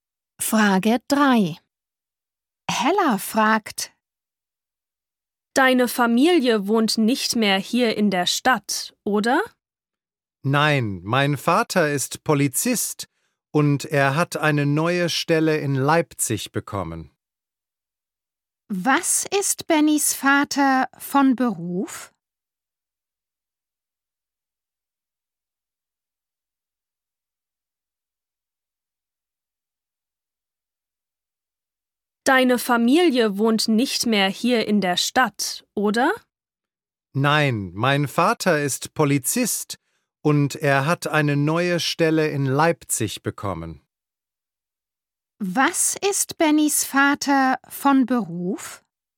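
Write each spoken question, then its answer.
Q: Was ist Bennys Vater von Beruf?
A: Polizist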